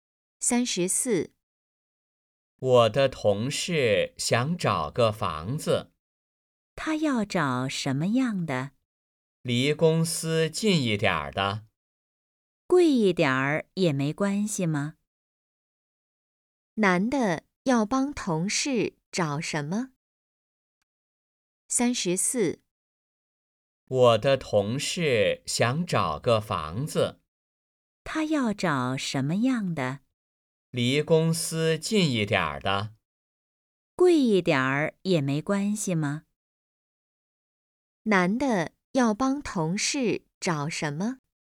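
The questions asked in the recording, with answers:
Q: 男的要帮同事找什么?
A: 房子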